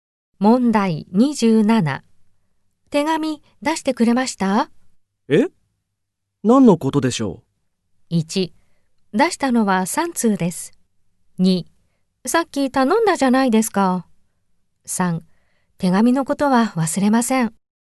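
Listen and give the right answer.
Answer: 2: さっき頼んだじゃないですか。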